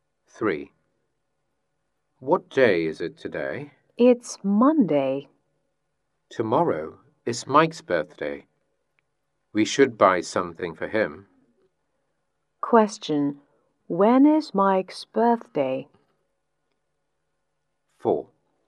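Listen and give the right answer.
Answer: Tuesday.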